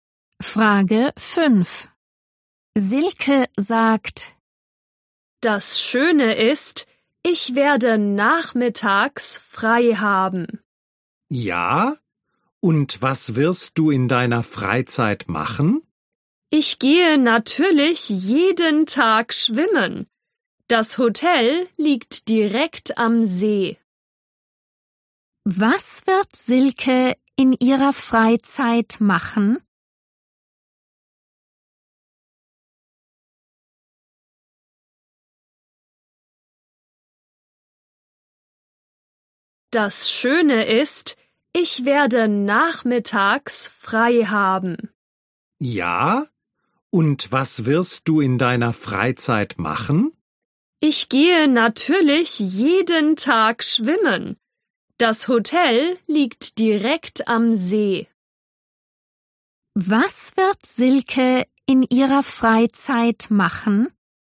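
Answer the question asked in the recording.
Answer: Jeden Tag schwimmen gehen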